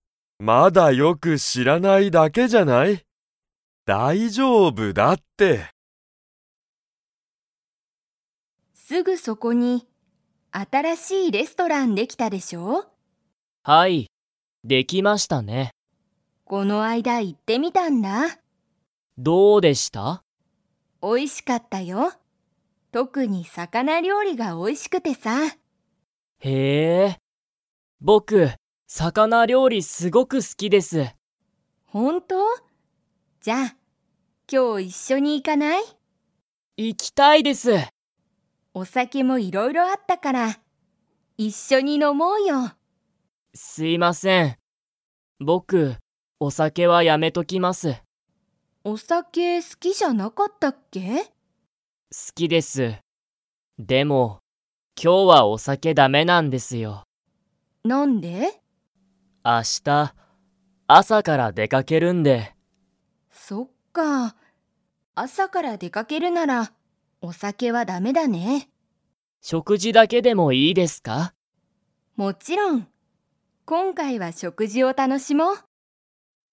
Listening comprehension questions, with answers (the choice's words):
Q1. 新あたらしいレストランは、特とくに がおいしい。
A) すし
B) ラーメン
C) 魚料理さかなりょうり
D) 朝あさご飯はん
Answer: 魚料理さかなりょうり

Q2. 今日きょう、鈴木すずきさんはお酒さけを飲のみますか?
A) はい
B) いいえ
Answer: いいえ

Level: Level 3